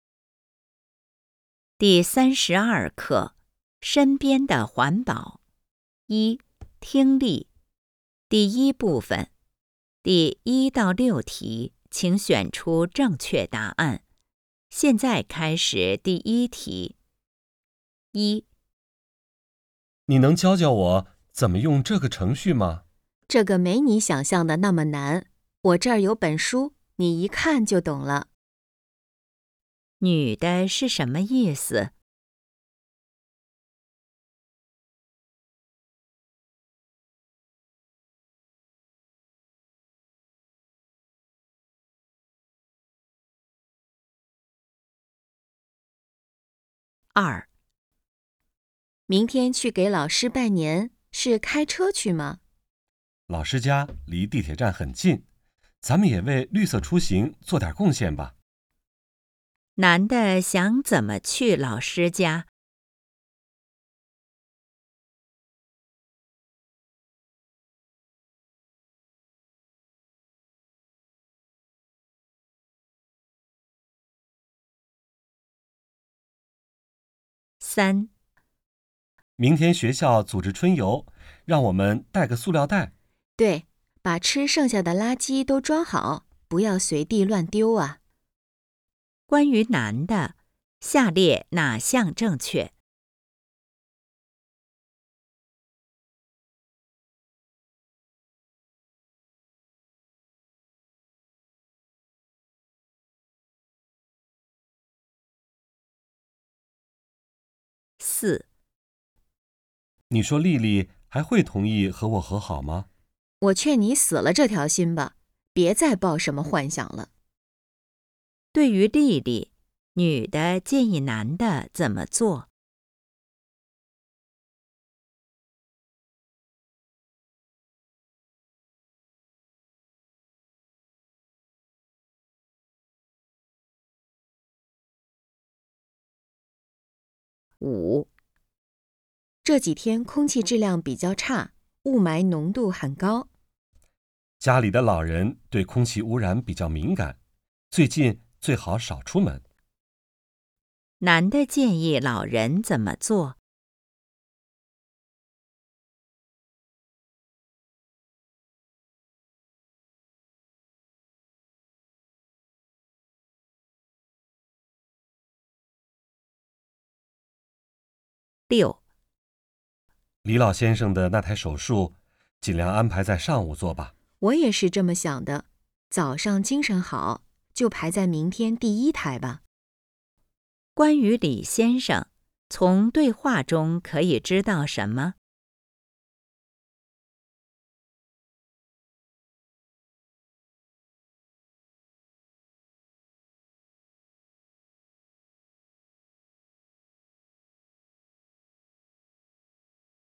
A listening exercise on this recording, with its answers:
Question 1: 女的是什么意思?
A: 很容易掌握

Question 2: 男的想怎么去老师家?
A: 乘地铁

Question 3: 关于男的, 下列哪项正确?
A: 明天要去春游

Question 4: 对于莉莉, 女的建议男的怎么做?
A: 放弃努力

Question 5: 男的建议老人怎么做?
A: 减少外出

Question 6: 关于李先生, 从对话中可以知道什么?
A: 明天要手术

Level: HSK 5